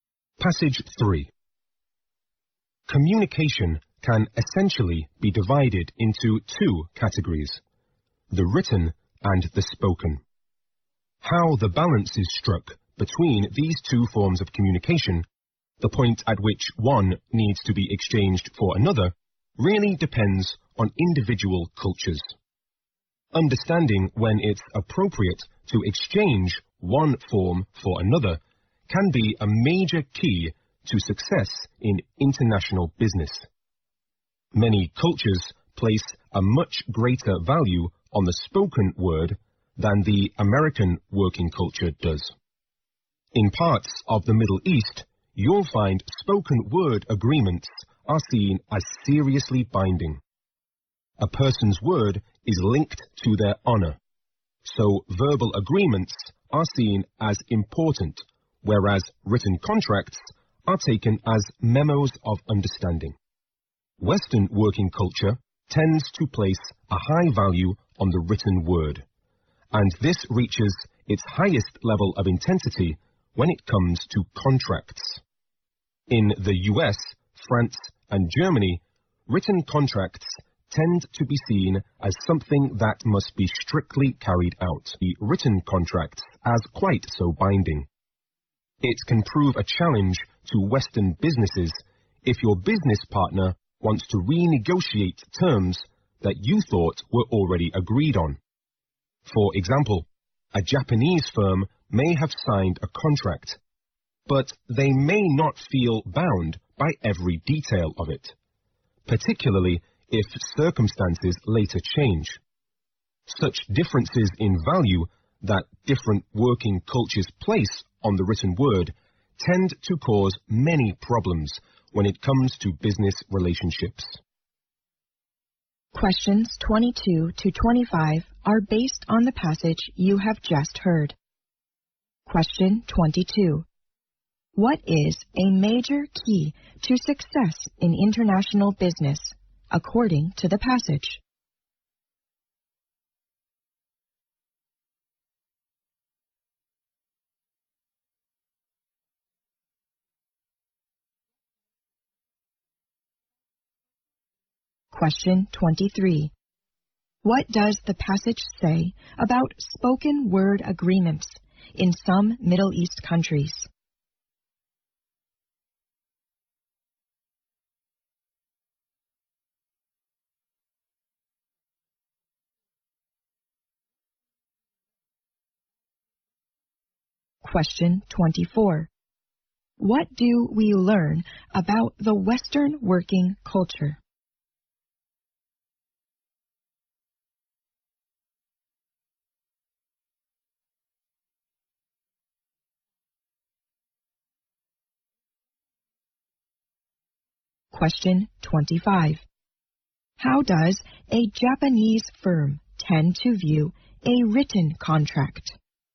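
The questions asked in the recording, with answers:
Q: What is a major key to success in international business, according to the passage?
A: Knowing when to switch between written and spoken communication.

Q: What does the passage say about spoken word agreements in some Middle East countries?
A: They are seen as seriously binding.

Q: What do we learn about the Western working culture?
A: It places a high value on the written word, especially contracts.

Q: How does a Japanese firm tend to view a written contract?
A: It may not feel bound by every detail, especially if circumstances change.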